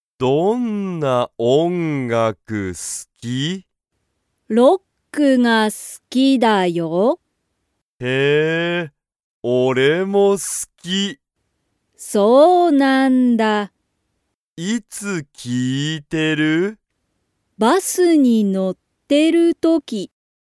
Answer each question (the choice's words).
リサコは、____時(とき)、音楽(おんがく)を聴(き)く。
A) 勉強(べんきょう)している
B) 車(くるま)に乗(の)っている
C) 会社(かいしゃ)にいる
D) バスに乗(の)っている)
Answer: バスに乗(の)っている)

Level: Level 1